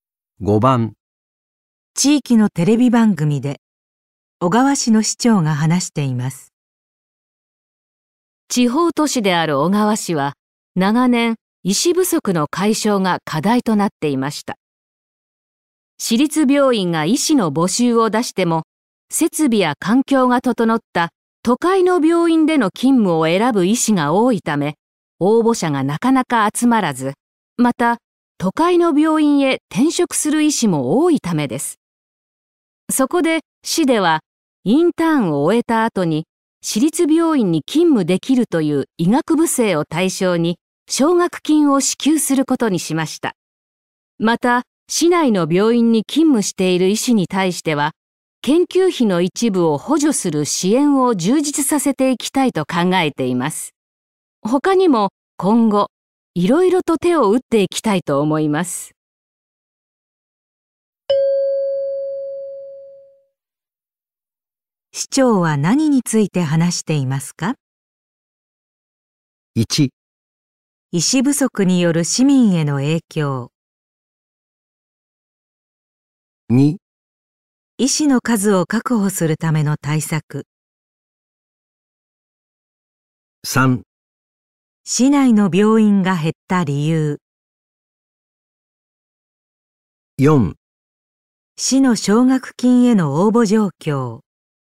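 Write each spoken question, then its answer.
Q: 市長は何について話していますか?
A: 2: 医師の数を確保するための対策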